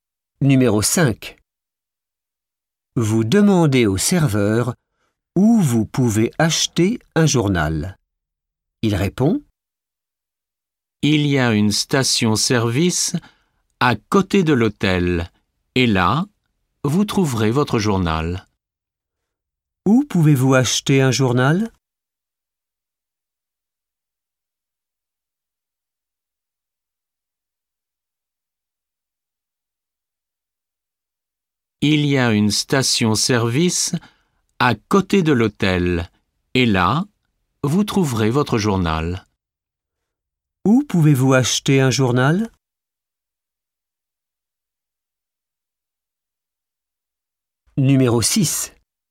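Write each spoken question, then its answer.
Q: Où pouvez-vous acheter un journal?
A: À la station-service à côté de l'hôtel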